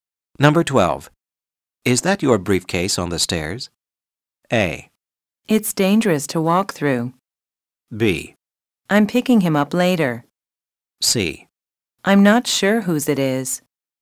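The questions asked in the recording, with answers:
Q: Is that your briefcase on the stairs?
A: C: I'm not sure whose it is.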